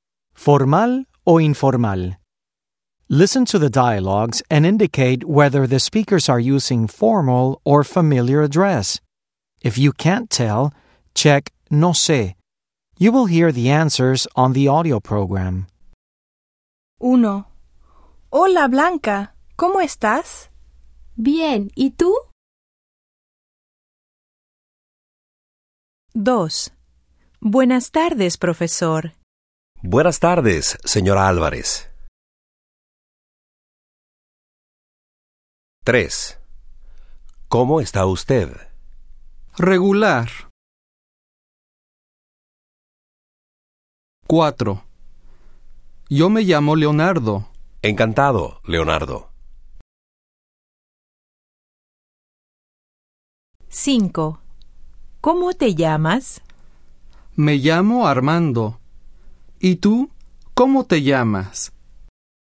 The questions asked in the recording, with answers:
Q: indicate whether the speakers are using formal or familiar address.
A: 1. Informal.

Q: indicate whether the speakers are using formal or familiar address.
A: 2. Formal.

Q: indicate whether the speakers are using formal or familiar address.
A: 3. Formal.

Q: indicate whether the speakers are using formal or familiar address.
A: 4. No sé.

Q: indicate whether the speakers are using formal or familiar address.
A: 5. Informal.